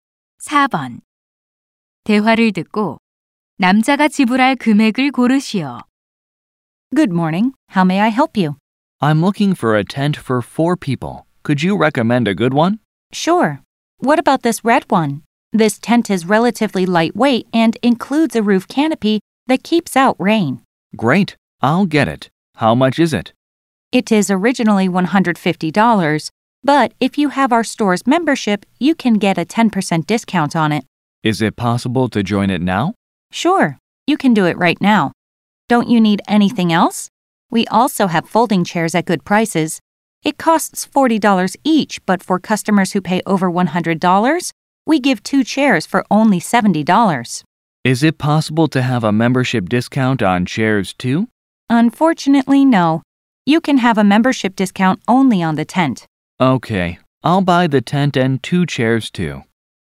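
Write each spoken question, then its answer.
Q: 대화를 듣고 남자가 지불할 금액을 고르시오.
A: $205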